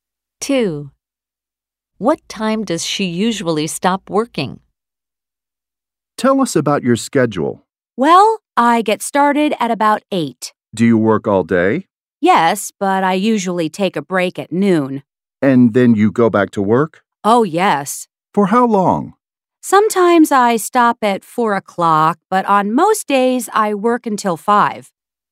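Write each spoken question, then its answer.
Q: What time does she usually stop working?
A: At 5 o'clock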